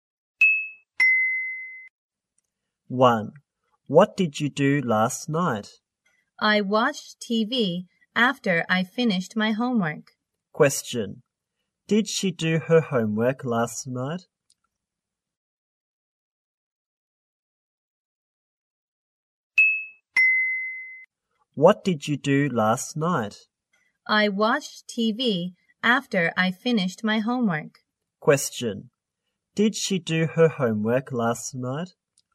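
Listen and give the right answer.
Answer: Yes, she did.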